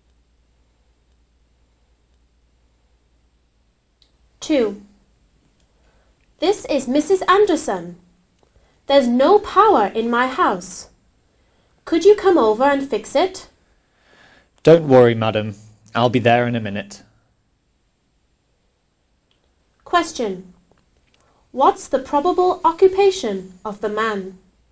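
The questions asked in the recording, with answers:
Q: What's the probable occupation of the man?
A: An electrician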